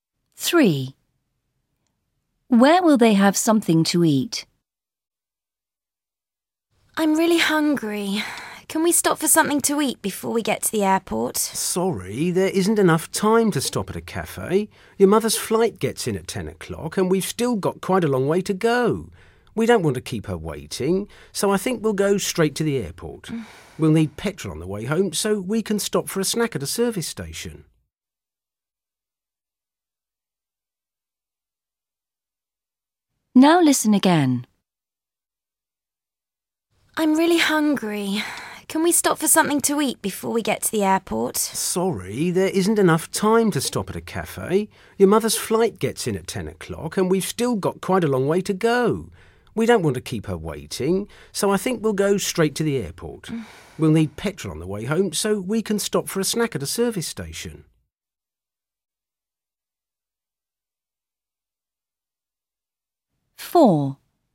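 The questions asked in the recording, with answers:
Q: Where will they have something to eat?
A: at a service station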